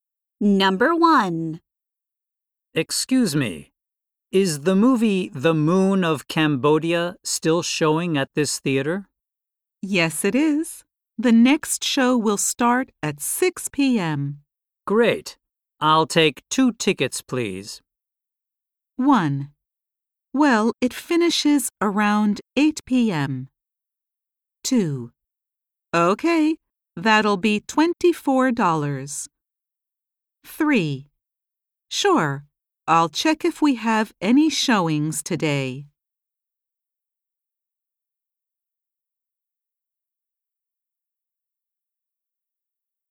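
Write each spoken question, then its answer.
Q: Great. I'll take 2 tickets, please.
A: 2: Okay, that'll be $24.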